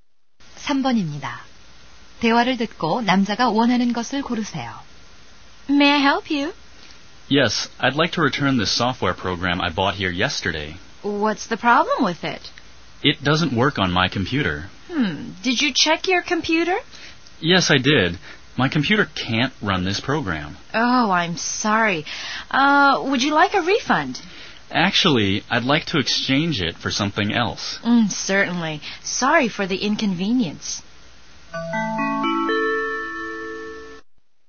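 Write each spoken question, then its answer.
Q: 대화를 듣고 남자가 원하는 것을 고르세요.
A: 다른 제품으로 교환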